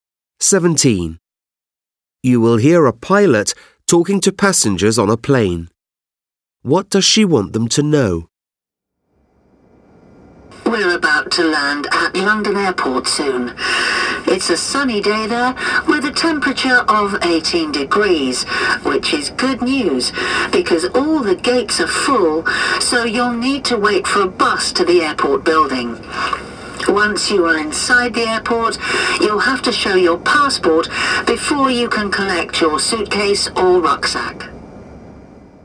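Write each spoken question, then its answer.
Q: What does she want them to know?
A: They will need to wait for a bus to the airport building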